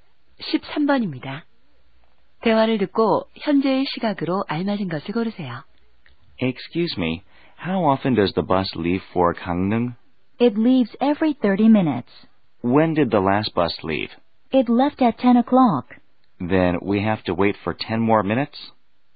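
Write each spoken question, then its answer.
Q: 대화를 듣고 현재의 시각으로 알맞은 것을 고르세요.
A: 10시 20분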